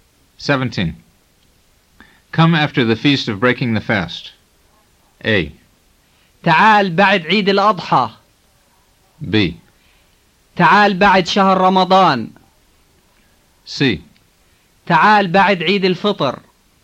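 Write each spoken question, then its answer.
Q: Come after the feast of breaking the fast.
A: C: تعال بعد عيد الفطر.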